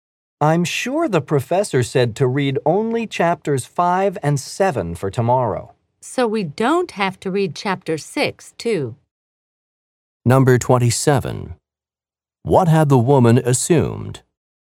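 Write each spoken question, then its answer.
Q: What had the woman assumed?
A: That they had to read chapter 6 too.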